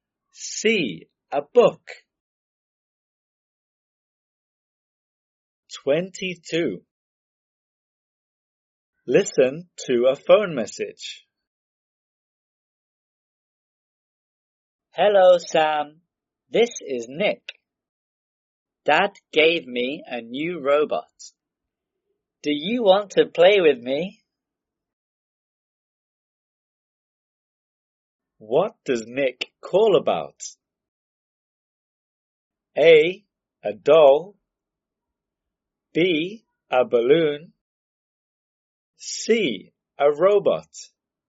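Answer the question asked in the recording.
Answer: C: A robot.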